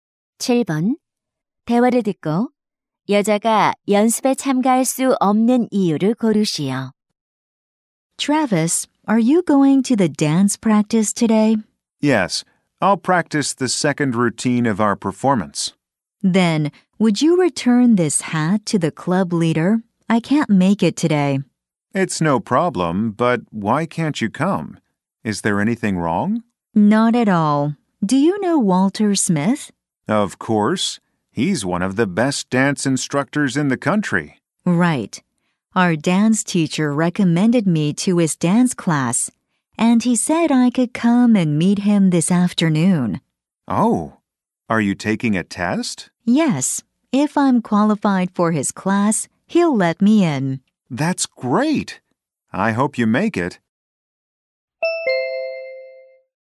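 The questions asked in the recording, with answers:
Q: 대화를 듣고 여자가 연습에 참가할 수 없는 이유를 고르시오.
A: 유명 댄스 강사의 수업에 들어가기 위한 테스트를 받으러 가야 해서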